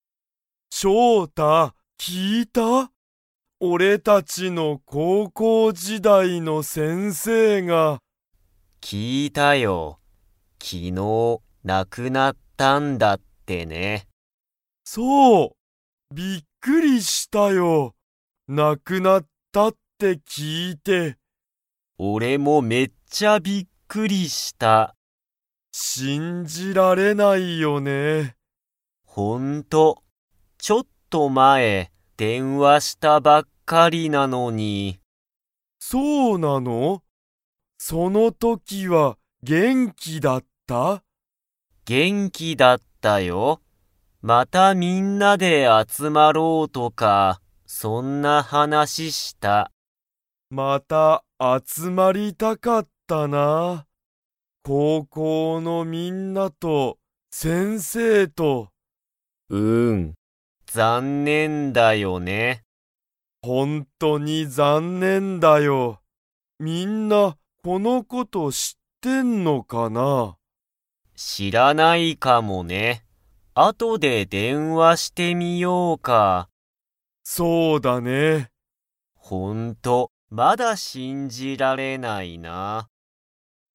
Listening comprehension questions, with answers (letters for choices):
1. 二人ふたりの高校こうこう時代じだいの先生せんせいは、いつ亡なくなりましたか?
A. 今日きょう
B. 昨日きのう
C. 明日あした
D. 一年いちねん前まえ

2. ショウタが電話でんわした時とき、先生せんせいは 。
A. 元気げんきだった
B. 元気げんきじゃなかった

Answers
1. B
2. A

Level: Level 3